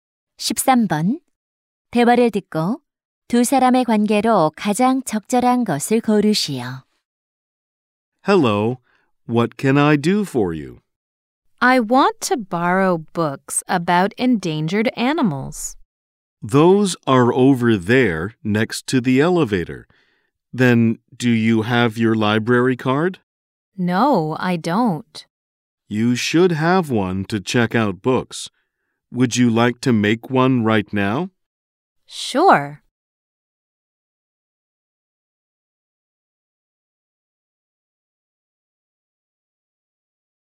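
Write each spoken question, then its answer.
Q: 대화를 듣고 두 사람의 관계로 가장 적절한 것을 고르시오.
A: 도서관 사서 - 이용객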